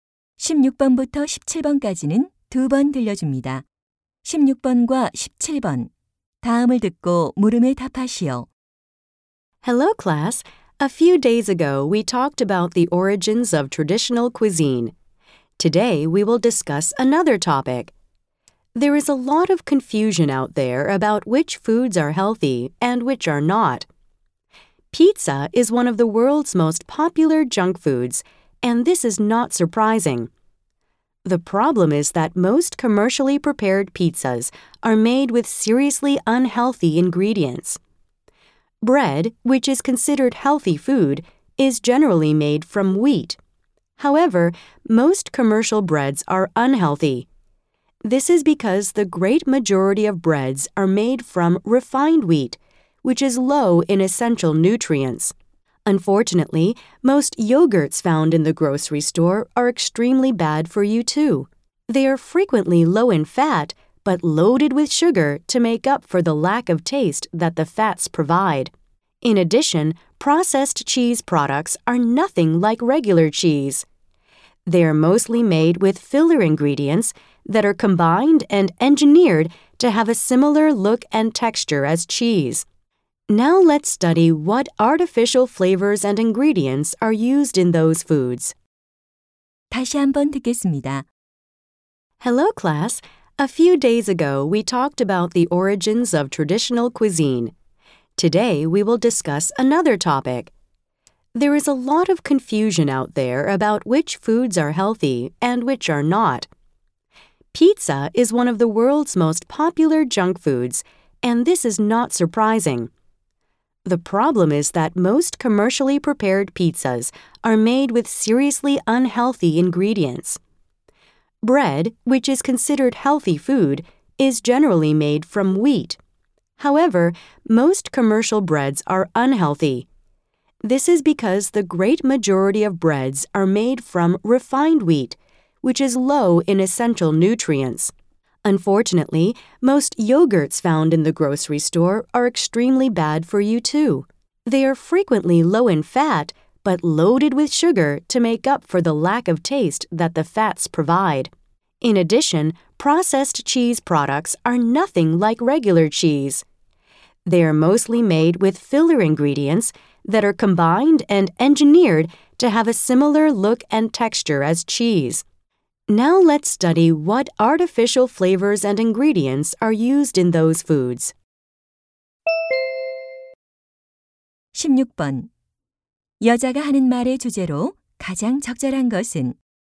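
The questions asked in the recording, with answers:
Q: 여자가 하는 말의 주제로 가장 적절한 것은?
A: 건강하다고 여겨지지만 실제로는 건강에 해로운 음식들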